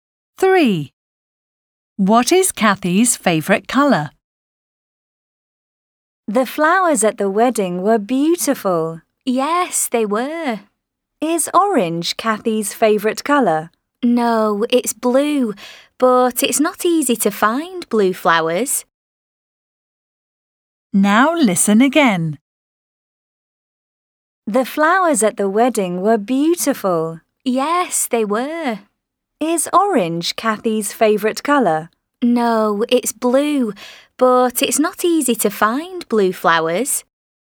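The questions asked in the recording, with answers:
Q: What is Kathy's favourite colour?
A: blue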